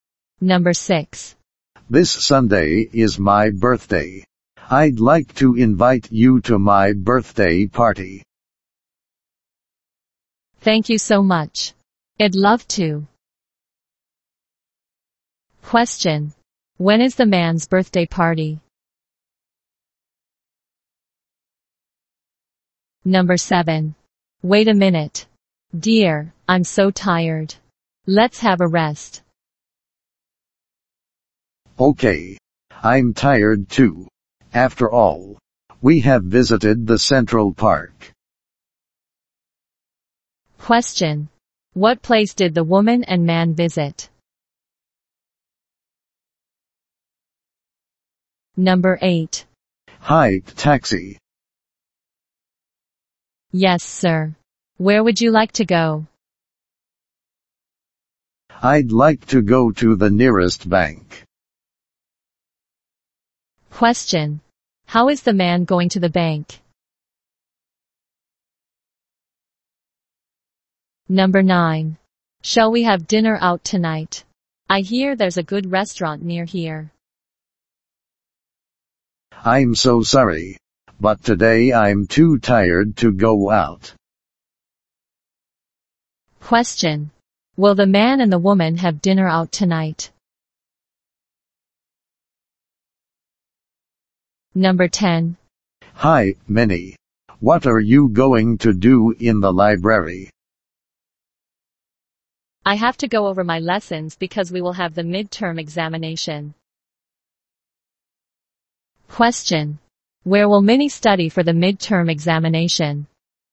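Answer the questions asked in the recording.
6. This Sunday
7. The Central Park
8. By taxi
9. No, they won't
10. In the library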